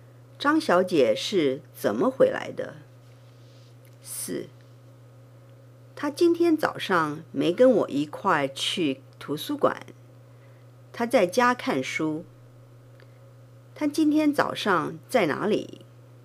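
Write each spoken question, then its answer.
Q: 她今天早上在哪里?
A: 在家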